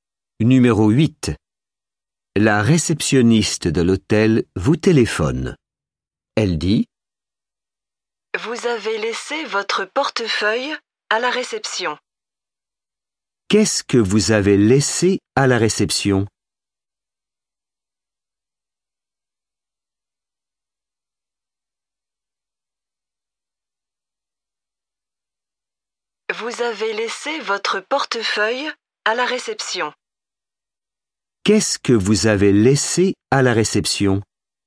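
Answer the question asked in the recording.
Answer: Votre portefeuille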